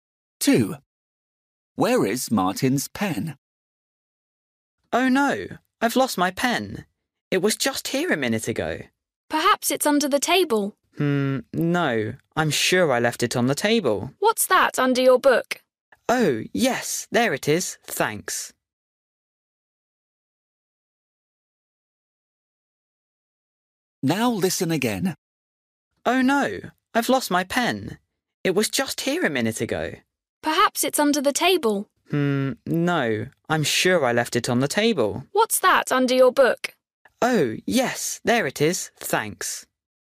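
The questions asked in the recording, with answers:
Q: Where is Martin's pen?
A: Under his book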